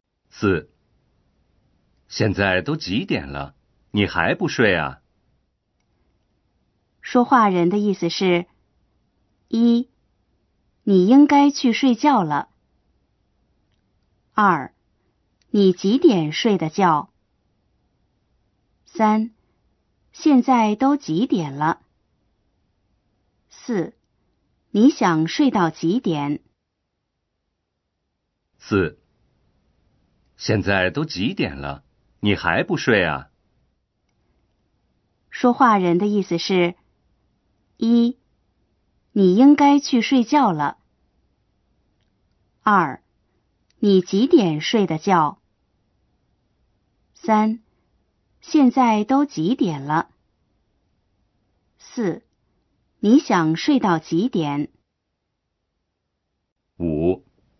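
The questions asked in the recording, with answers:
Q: 说话人的意思是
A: 1: 你应该去睡觉了。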